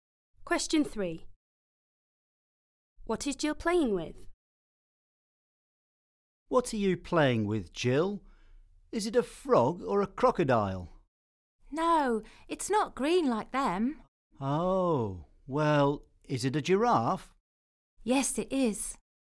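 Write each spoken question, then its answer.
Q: What is Jill playing with?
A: A giraffe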